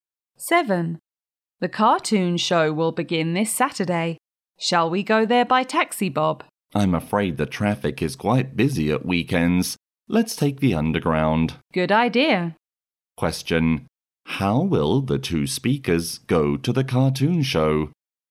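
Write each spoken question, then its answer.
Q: How will the two speakers go to the cartoon show?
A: By underground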